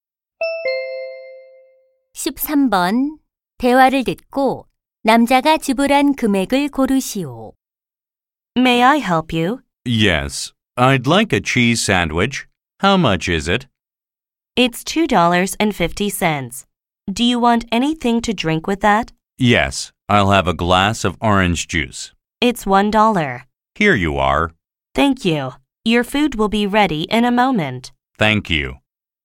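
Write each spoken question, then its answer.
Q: 대화를 듣고 남자가 지불한 금액을 고르시오.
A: 3.50달러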